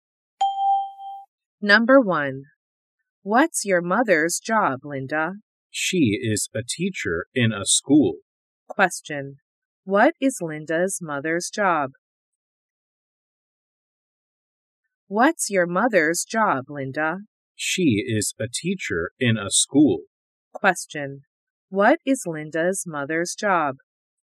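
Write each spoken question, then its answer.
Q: What is Linda's mother's job?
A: She is a teacher.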